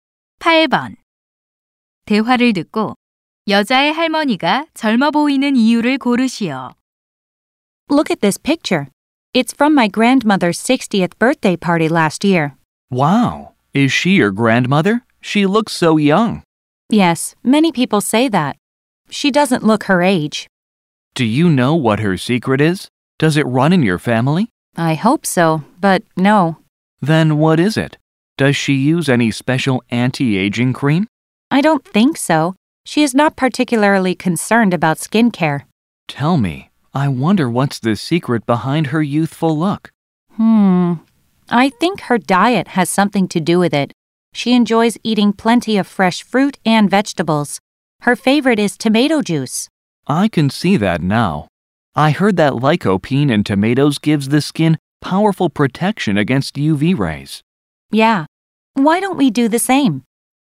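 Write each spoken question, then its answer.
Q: 대화를 듣고 여자의 할머니가 젊어 보이는 이유를 고르시오.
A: 신선한 과일과 채소(토마토 주스)를 즐겨 먹는 식습관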